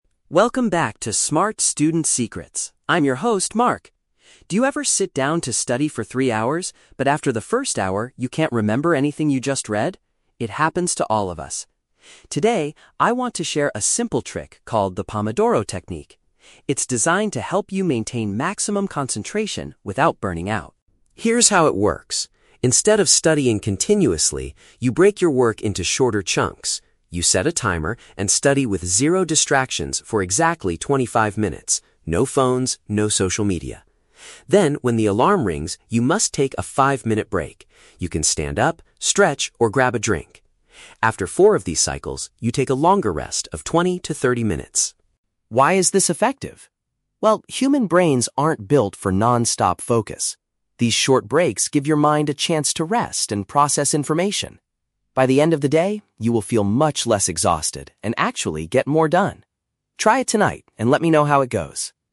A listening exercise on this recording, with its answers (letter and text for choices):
Listen to the podcast host talking about a study method and choose the correct answer (A, B, or C) for each question.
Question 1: Why does the host recommend the Pomodoro Technique?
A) To help students study continuously for three hours.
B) To prepare students for their difficult final exams.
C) To prevent students from feeling mentally exhausted.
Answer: C) To prevent students from feeling mentally exhausted.

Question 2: What should a student do immediately after working for twenty-five minutes?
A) Have a brief period of relaxation.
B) Check their mobile phones for messages.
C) Review everything they have just read.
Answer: A) Have a brief period of relaxation.

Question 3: According to the host, why are these short breaks effective?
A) Because human brains are naturally built for non-stop focus.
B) They help the mind recover and absorb the material.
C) They give students enough time to cook a healthy meal.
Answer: B) They help the mind recover and absorb the material.

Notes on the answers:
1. The host says the technique is designed to help you study "without burning out," which means to prevent feeling mentally exhausted. Option A is a trap; the host mentions "three hours" and "studying continuously," but he says this is a bad habit you should avoid. Option B is plausible (students study for exams), but exams are never mentioned in the audio.
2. The host states that when the alarm rings, "you must take a five-minute break." Option A paraphrases a five-minute break as a "brief period of relaxation." Option B is a trap; "phones" are mentioned in the audio, but the host specifically says "No phones" during the study period, and doesn't tell you to check them on breaks. Option C is a plausible study tip but is not mentioned.
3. The host explains that breaks "give your mind a chance to rest and process information." Option B perfectly paraphrases "rest" as "recover" and "process information" as "absorb the material." Option A is a trap; it uses the exact words "built for non-stop focus," but the host actually says human brains aren't built for that. Option C is not mentioned.

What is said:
Mark: Welcome back to 'Smart Student Secrets'. I'm your host, Mark. Do you ever sit down to study for three hours, but after the first hour, you can't remember anything you just read? It happens to all of us. Today, I want to share a simple trick called the Pomodoro Technique. It's designed to help you maintain maximum concentration without burning out.
Here is how it works. Instead of studying continuously, you break your work into shorter chunks. You set a timer and study with zero distractions for exactly twenty-five minutes. No phones, no social media. Then, when the alarm rings, you must take a five-minute break. You can stand up, stretch, or grab a drink. After four of these cycles, you take a longer rest of twenty to thirty minutes.
Why is this effective? Well, human brains aren't built for non-stop focus. These short breaks give your mind a chance to rest and process information. By the end of the day, you will feel much less exhausted and actually get more done. Try it tonight and let me know how it goes!